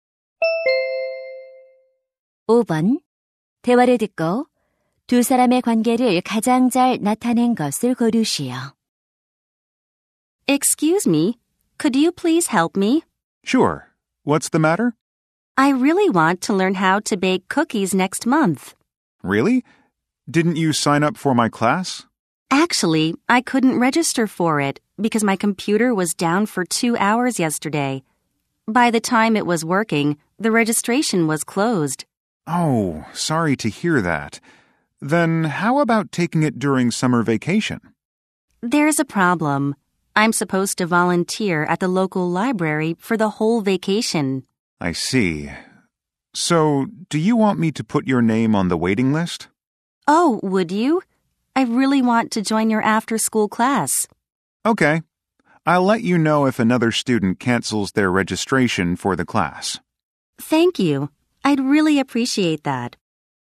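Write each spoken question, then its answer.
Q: 대화를 듣고 두 사람의 관계를 가장 잘 나타낸 것을 고르시오.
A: 제빵 방과후 수업 교사와 학생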